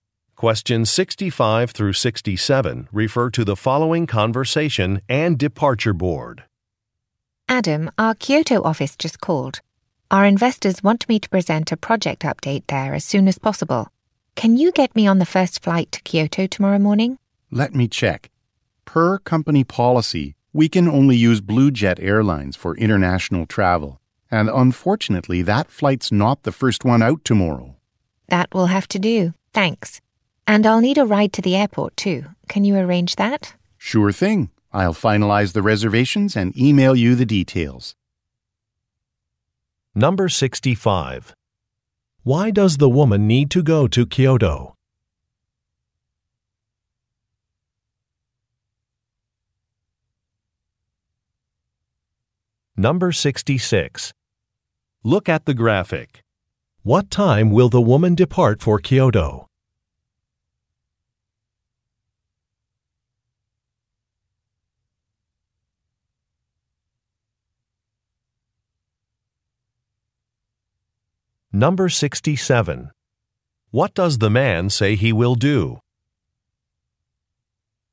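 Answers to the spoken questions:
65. To present a project update to investors
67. Finalize the reservations and email her the details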